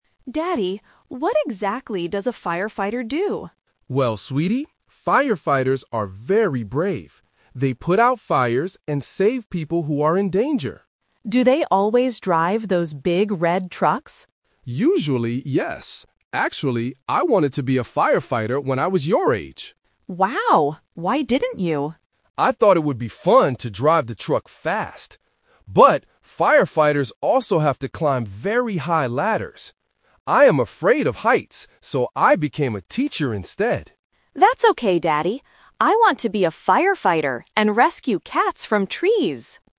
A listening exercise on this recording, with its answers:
Listen to the conversation between a father and his daughter. Circle the correct answer (A, B, or C).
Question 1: What is the dad's job now?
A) A firefighter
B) A truck driver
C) A teacher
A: C) A teacher

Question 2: Why didn't the dad become a firefighter?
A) He didn't like red trucks.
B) He is afraid of climbing high.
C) He doesn't like rescuing cats.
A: B) He is afraid of climbing high.

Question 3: What does Lily want to do when she grows up?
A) Save cats from trees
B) Climb high ladders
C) Drive a red truck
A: A) Save cats from trees

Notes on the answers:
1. The dad says, "...so I became a teacher instead." Option (A) is the trap because he wanted to be a firefighter when he was little. Option (B) is a trap because "drive the truck" is mentioned, but it's not his job.
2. The dad says, "But firefighters also have to climb very high ladders. I am afraid of heights..." Option (A) is wrong because he actually thought driving the trucks "would be fun". Option (C) is a plausible guess, but rescuing cats is what Lily wants to do, not the dad's reason.
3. At the end, Lily says, "I want to be a firefighter and rescue cats from trees!" Option (B) is a trap using the dad's fear (high ladders). Option (C) is a plausible activity for a firefighter, but Lily specifically mentions rescuing cats.

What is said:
Lily: Daddy, what exactly does a firefighter do?
Dad: Well, sweetie, firefighters are very brave. They put out fires and save people who are in danger.
Lily: Do they always drive those big red trucks?
Dad: Usually, yes. Actually, I wanted to be a firefighter when I was your age.
Lily: Wow! Why didn't you?
Dad: I thought it would be fun to drive the truck fast. But firefighters also have to climb very high ladders. I am afraid of heights, so I became a teacher instead.
Lily: That's okay, Daddy. I want to be a firefighter and rescue cats from trees!

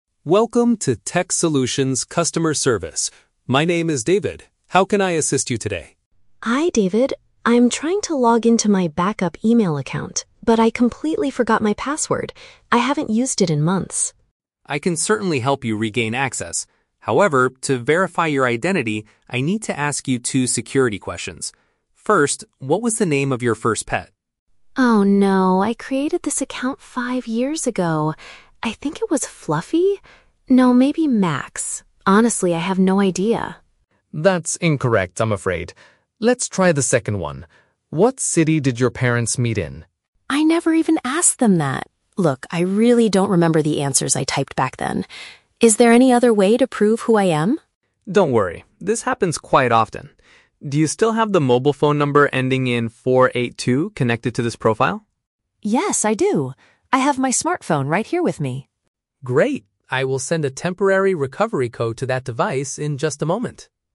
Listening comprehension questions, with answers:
Listen to the phone conversation between a user and a technical support agent. Choose the correct answer (A, B, or C) for each question.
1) What is the woman's main problem?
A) She wants to update the phone number on her account.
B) She cannot remember the password for her extra email address.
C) She needs help setting up new security questions.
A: B) She cannot remember the password for her extra email address.

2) Why is the woman unable to answer the security questions?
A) She set up the profile a long time ago and cannot recall the details.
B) She never chose any security questions when she made the account.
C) She gave the account to her parents five years ago.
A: A) She set up the profile a long time ago and cannot recall the details.

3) How will David help the woman get her account back?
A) By sending a special login code via text message.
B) By calling her parents to confirm her personal information.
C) By emailing a recovery link to her main email address.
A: A) By sending a special login code via text message.

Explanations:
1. The woman says, "I'm trying to log into my backup email account, but I completely forgot my password." "Extra email address" is a paraphrase of "backup email", and "cannot remember" means "forgot". Why the traps are wrong: Option A is plausible since phone numbers are discussed later, but it is not her main problem. Option C is a trap; she talks about security questions with the agent, but she didn't call to set up new ones; she called because she was locked out.
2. She says, "I created this account five years ago! ... Look, I really don't remember the answers I typed back then." "Five years ago" matches "a long time ago," and "cannot recall" means she doesn't remember. Why the traps are wrong: Option B is incorrect because she did type answers back then, she just forgot them. Option C is a trap; it uses the words "parents" and "five years ago" from the audio, but the meaning is completely wrong.
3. David asks if she has the "mobile phone number ending in 4-8-2" and says he will send a "temporary recovery code to that device". This means he is sending a text message with a code. Why the traps are wrong: Option B is a trap because the audio mentions "parents" (in a security question), but David is not going to call them. Option C is a very plausible technical support solution, but it is not the method David uses in the audio (he uses her phone, not an email).

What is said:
David: Welcome to Tech Solutions customer service. My name is David. How can I assist you today?
Woman: Hi David. I'm trying to log into my backup email account, but I completely forgot my password. I haven't used it in months.
David: I can certainly help you regain access. However, to verify your identity, I need to ask you two security questions. First, what was the name of your first pet?
Woman: Oh no... I created this account five years ago! I think it was Fluffy? No, maybe Max? Honestly, I have no idea.
David: That's incorrect, I'm afraid. Let's try the second one: What city did your parents meet in?
Woman: I never even asked them that! Look, I really don't remember the answers I typed back then. Is there any other way to prove who I am?
David: Don't worry, this happens quite often. Do you still have the mobile phone number ending in 4-8-2 connected to this profile?
Woman: Yes, I do! I have my smartphone right here with me.

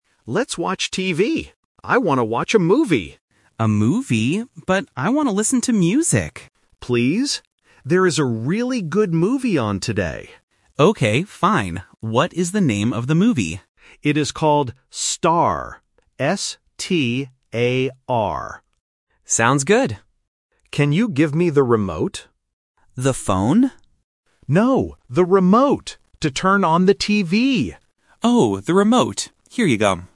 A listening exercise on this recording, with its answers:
Listen to the conversation and choose the correct answer (A, B, or C).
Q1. What does Alex want to do?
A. Listen to music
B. Watch a movie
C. Play a game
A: B. Watch a movie

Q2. What is the name of the movie?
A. S-T-A-R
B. S-P-A-R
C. S-T-A-R-T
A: A. S-T-A-R

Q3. What does Alex ask Ben to give him?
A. The phone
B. The TV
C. The remote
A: C. The remote

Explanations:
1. The correct answer is B. Alex says clearly, "I want to watch a movie". Option A (Listen to music) is the trap because Ben mentions it ("But I want to listen to music"), but they do not choose to do this. Option C is not mentioned.
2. The correct answer is A. Alex clearly spells the name of the movie: "S-T-A-R". Option B is a plausible wrong spelling. Option C (S-T-A-R-T) is a trap because the word "start" is very common and sounds similar to "star".
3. The correct answer is C. Alex asks, "Can you give me the remote?". Option A (The phone) is the trap because Ben mishears and asks "The phone?" before Alex corrects him. Option B is related to the context but Alex does not ask Ben to give him the TV.

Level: A1

